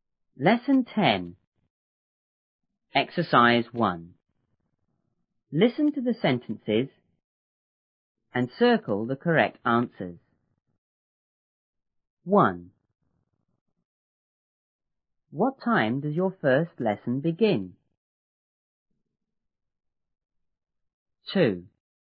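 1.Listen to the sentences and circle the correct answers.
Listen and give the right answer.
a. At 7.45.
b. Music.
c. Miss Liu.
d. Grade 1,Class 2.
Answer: a. At 7.45.

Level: 初中英语广州版1B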